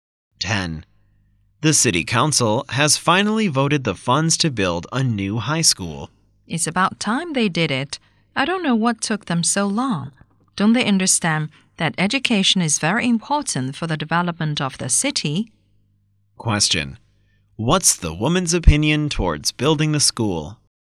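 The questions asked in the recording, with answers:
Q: What's the woman's opinion towards building the school?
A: It should have been done earlier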